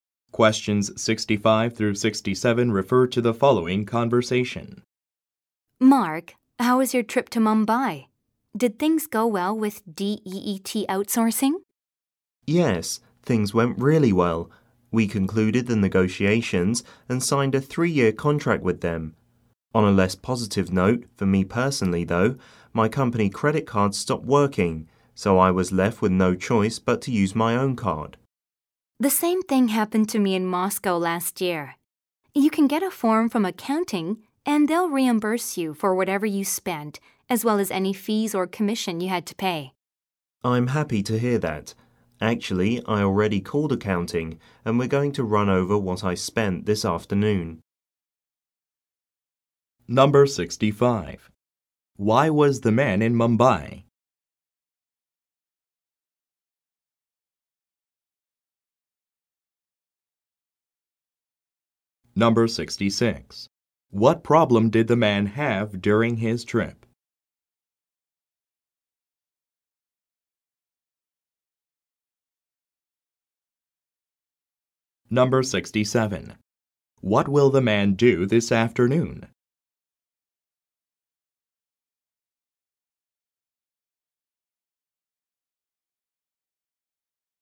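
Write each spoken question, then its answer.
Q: Why was the man in Mumbai?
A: To negotiate and sign a contract with DEET Outsourcing

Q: What problem did the man have during his trip?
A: His company credit card stopped working

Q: What will the man do this afternoon?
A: Go over his expenses with accounting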